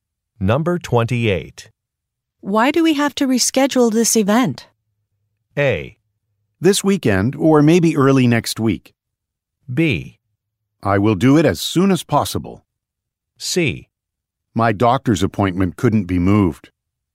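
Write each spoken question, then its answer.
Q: Why do we have to reschedule this event?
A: C: My doctor's appointment couldn't be moved.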